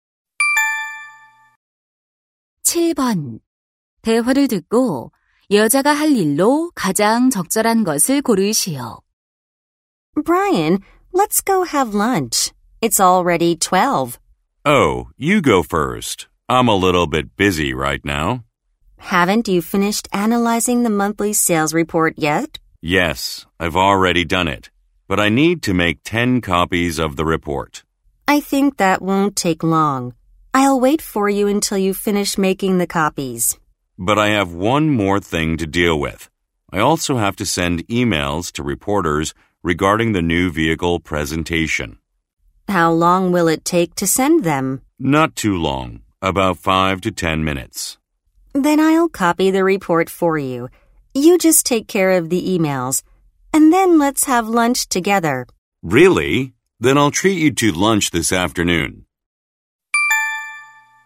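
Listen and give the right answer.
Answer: 보고서 복사하기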